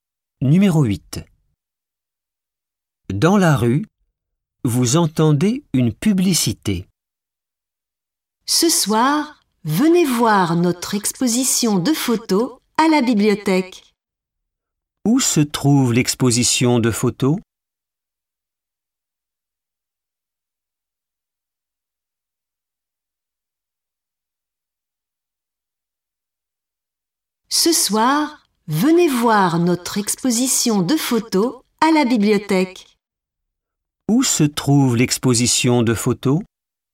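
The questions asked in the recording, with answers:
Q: Où se trouve l'exposition de photos ?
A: À la bibliothèque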